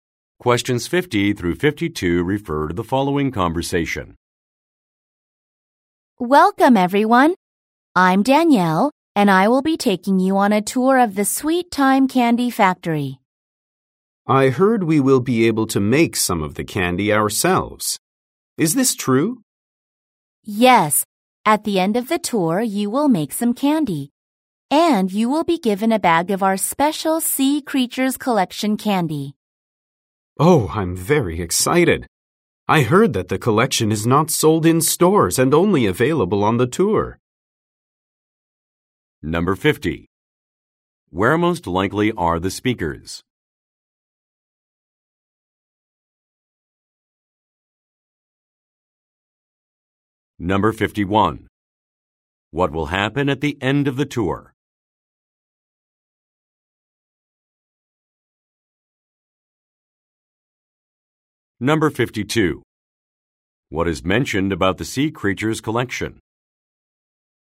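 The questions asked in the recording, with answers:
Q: Where most likely are the speakers?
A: At a candy factory

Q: What will happen at the end of the tour?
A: Visitors will make candy

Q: What is mentioned about the Sea Creatures Collection?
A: It is only available on the tour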